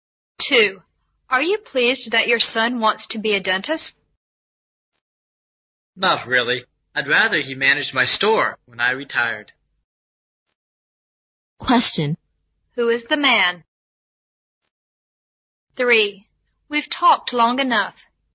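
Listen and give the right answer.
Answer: A store owner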